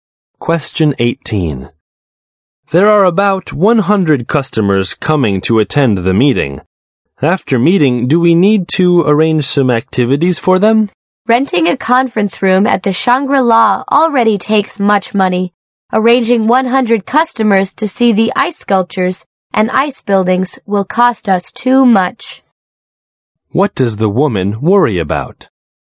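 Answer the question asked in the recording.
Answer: The cost will be too high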